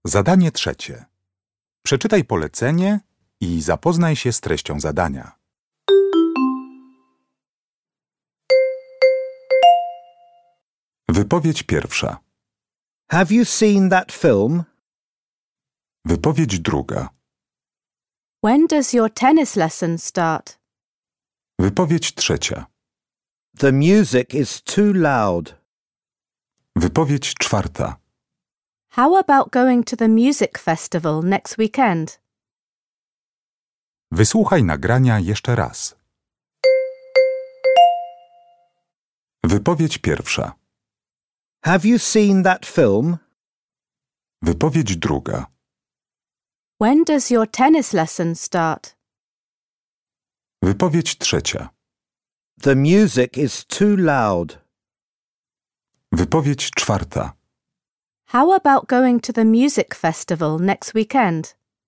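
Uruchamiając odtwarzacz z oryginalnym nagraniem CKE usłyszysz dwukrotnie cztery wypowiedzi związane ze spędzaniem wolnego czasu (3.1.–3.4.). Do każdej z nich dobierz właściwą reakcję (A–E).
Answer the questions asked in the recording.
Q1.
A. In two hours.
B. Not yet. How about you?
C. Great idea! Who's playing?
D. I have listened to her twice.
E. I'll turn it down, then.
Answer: B. Not yet. How about you?
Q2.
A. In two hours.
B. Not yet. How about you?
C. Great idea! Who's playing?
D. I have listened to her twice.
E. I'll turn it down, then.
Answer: A. In two hours.
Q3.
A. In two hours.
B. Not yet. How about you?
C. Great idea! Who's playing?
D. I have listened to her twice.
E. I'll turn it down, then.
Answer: E. I'll turn it down, then.
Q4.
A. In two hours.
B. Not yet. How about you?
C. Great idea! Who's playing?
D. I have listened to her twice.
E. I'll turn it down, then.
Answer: C. Great idea! 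Who's playing?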